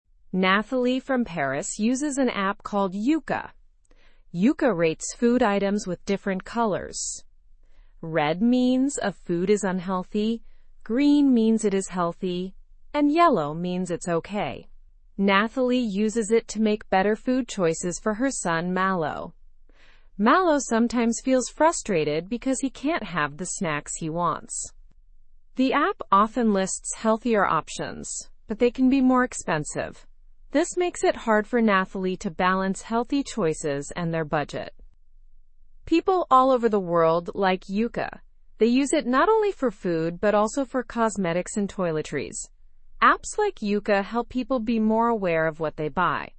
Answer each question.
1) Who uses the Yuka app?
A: Nathalie from Paris uses the Yuka app.

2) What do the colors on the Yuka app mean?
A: Green means healthy, red means unhealthy, and yellow means okay.

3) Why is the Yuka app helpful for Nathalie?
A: It helps her make healthier choices for her son, Malo.

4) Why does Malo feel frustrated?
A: Malo can't always get the snacks he wants because they aren't always healthy.

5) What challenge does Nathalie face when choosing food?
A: The healthier options suggested by Yuka are often more expensive.

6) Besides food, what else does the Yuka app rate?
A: Yuka also rates cosmetics and toiletries.

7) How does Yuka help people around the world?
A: It helps them become more aware of their purchases.

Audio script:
Nathalie from Paris uses an app called Yuka. Yuka rates food items with different colors. Red means a food is unhealthy, green means it is healthy, and yellow means it's okay. Nathalie uses it to make better food choices for her son, Malo.
Malo sometimes feels frustrated because he can't have the snacks he wants. The app often lists healthier options, but they can be more expensive. This makes it hard for Nathalie to balance healthy choices and their budget.
People all over the world like Yuka. They use it not only for food but also for cosmetics and toiletries. Apps like Yuka help people be more aware of what they buy.

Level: Level 2